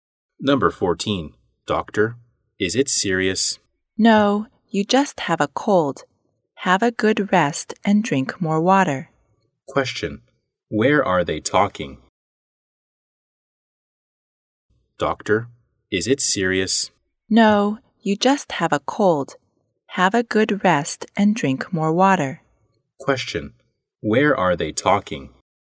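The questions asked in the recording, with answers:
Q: Where are they talking?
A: In a hospital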